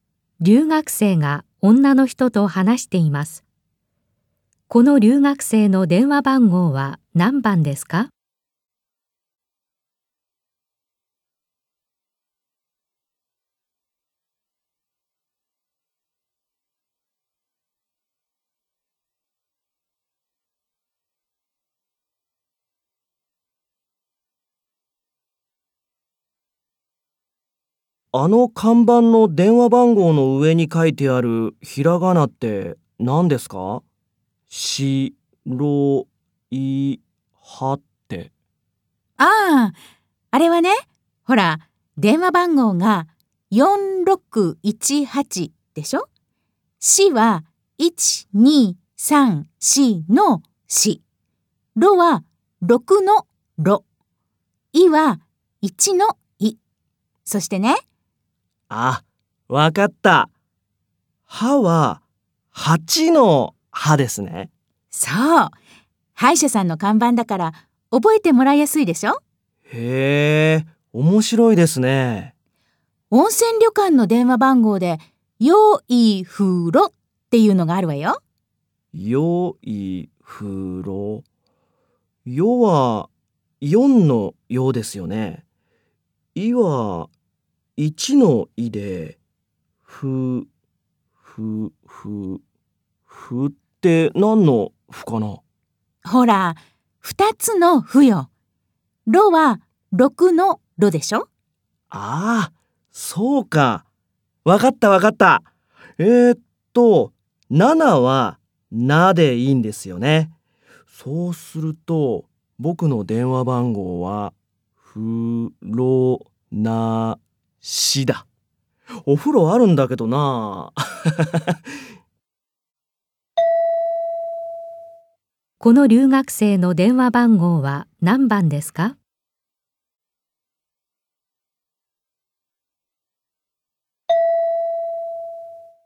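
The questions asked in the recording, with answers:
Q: この留学生の電話番号は何番ですか?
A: 2674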